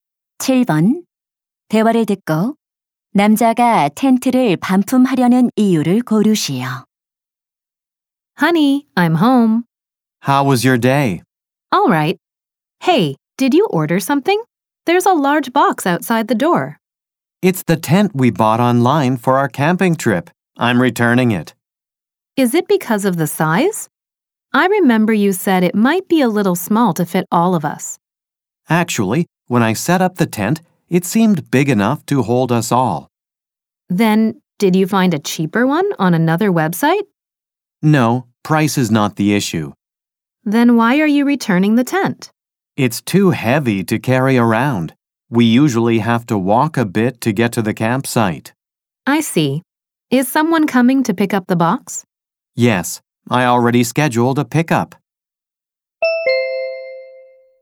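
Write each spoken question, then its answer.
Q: 7번 대화를 듣고 남자가 텐트를 반품하려는 이유를 고르시오.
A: 텐트가 너무 무거워서 들고 다니기 힘들어서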